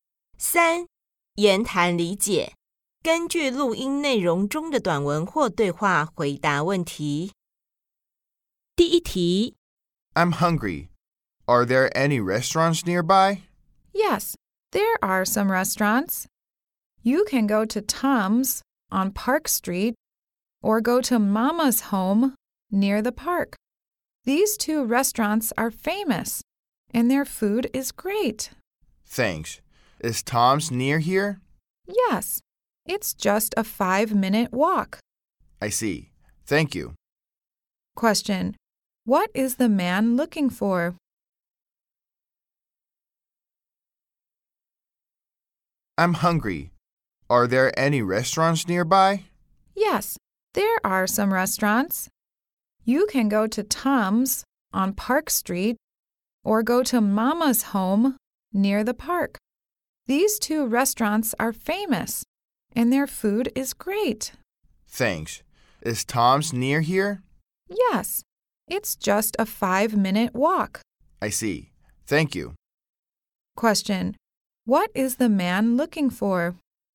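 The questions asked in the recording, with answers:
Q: What is the man looking for?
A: A restaurant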